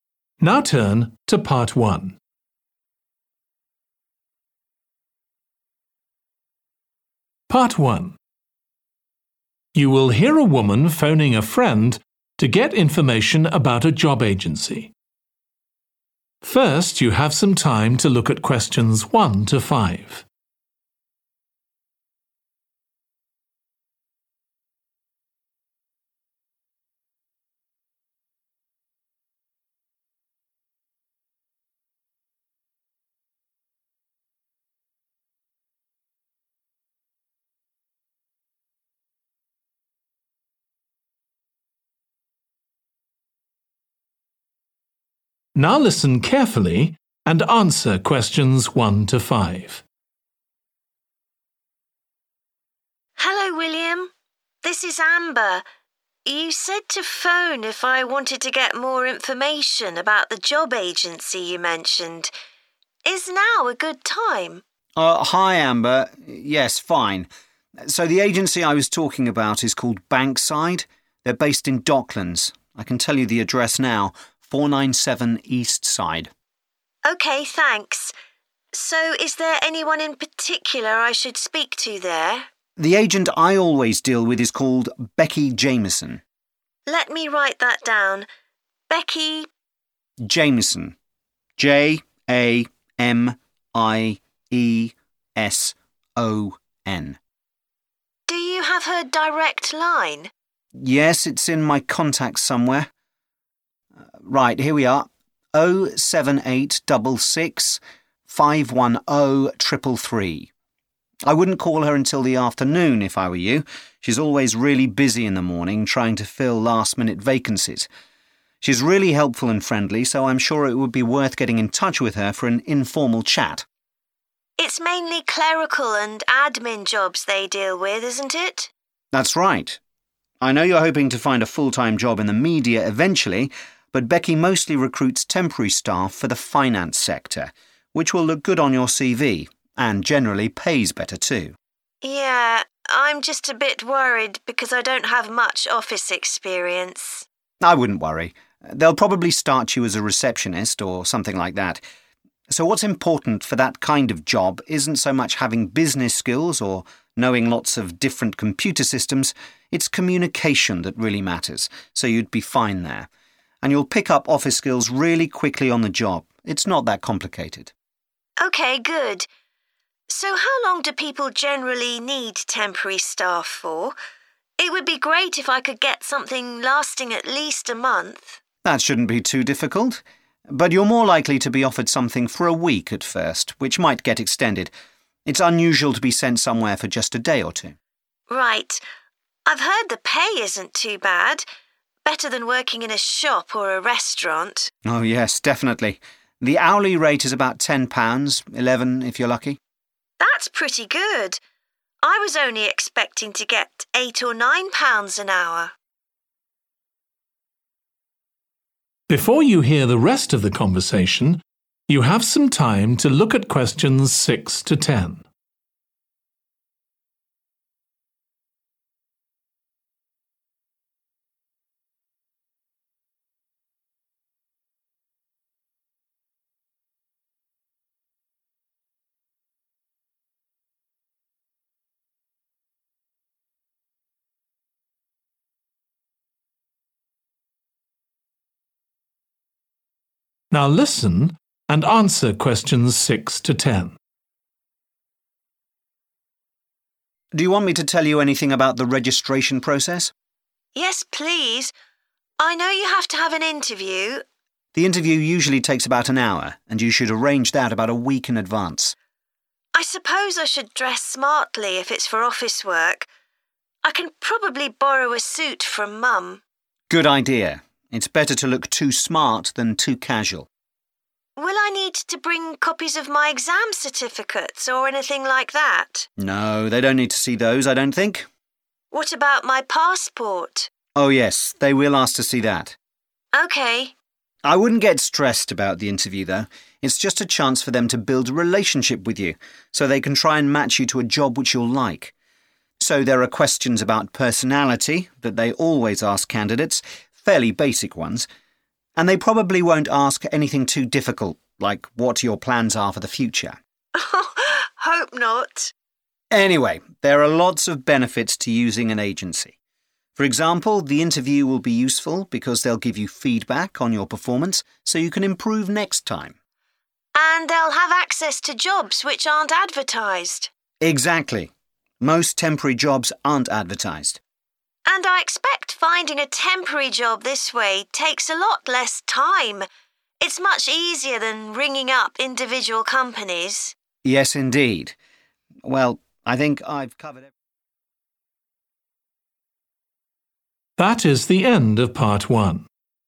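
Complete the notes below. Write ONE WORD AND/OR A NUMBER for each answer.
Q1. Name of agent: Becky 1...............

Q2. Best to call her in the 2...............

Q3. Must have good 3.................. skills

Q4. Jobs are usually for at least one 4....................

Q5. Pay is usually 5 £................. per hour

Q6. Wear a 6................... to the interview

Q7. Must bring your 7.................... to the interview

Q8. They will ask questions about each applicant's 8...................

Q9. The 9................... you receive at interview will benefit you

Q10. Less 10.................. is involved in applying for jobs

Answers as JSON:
{"1": "Jamieson", "2": "afternoon", "3": "communication", "4": "week", "5": "10", "6": "suit", "7": "passport", "8": "personality", "9": "feedback", "10": "time"}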